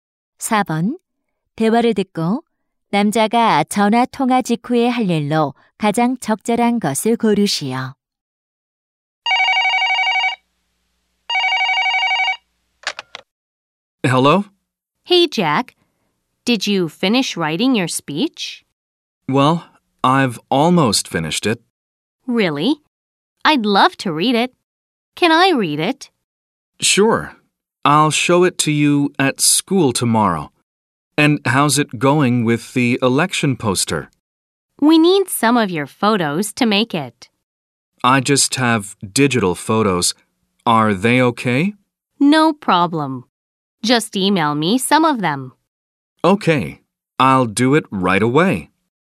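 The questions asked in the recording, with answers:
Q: 대화를 듣고 남자가 전화 통화 직후에 할 일로 가장 적절한 것을 고르시오.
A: 사진을 이메일로 보내기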